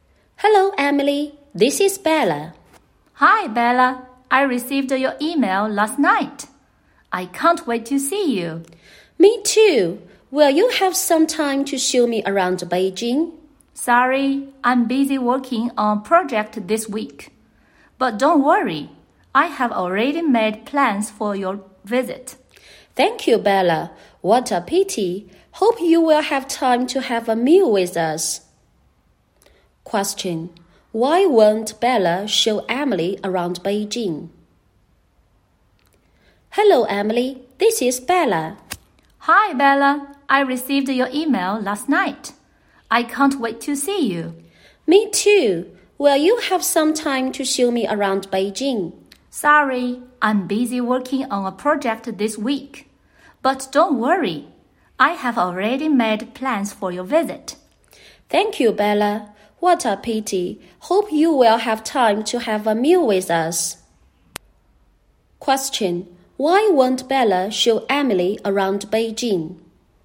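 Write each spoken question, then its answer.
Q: Question. Why won't Bella show Emily around Beijing?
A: She is busy working on a project this week.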